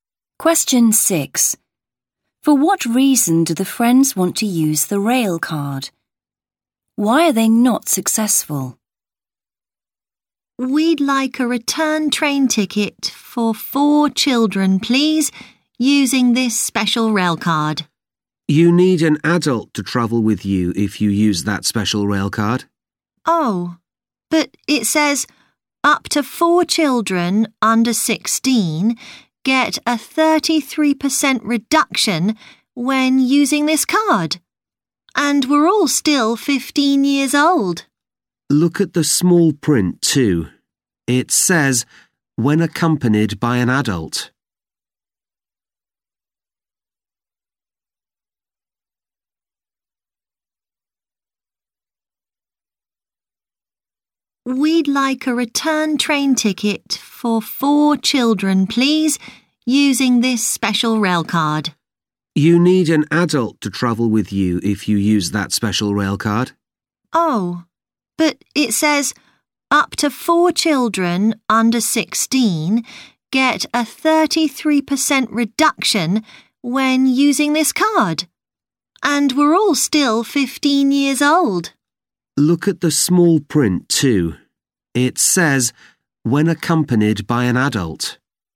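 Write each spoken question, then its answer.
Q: For what reason do the friends want to use the rail card?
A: To get a 33% reduction on the tickets

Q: Why are they not successful?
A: They need an adult to travel with them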